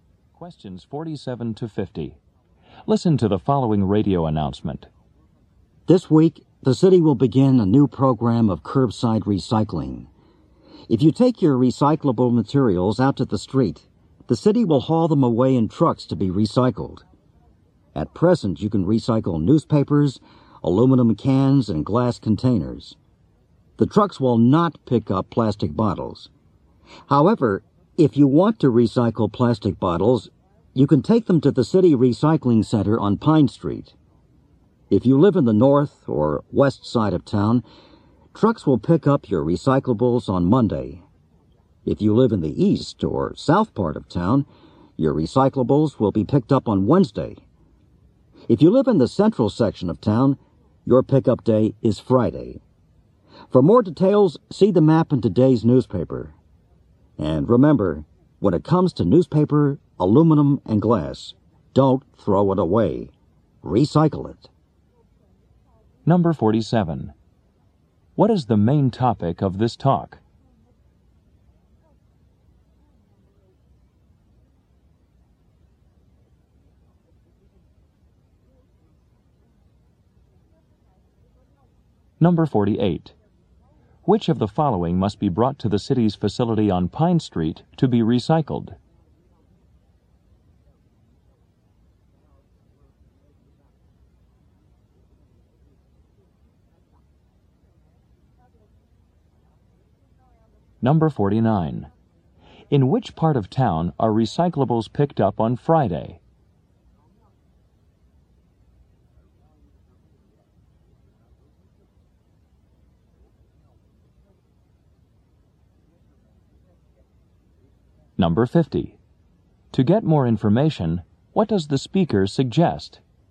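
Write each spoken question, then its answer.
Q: What is the main topic of this talk?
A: A new curbside recycling program

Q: Which of the following must be brought to the city's facility on Pine Street to be recycled?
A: Plastic bottles

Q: In which part of town are recyclables picked up on Friday?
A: The central section

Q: To get more information, what does the speaker suggest?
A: Look at the map in today's newspaper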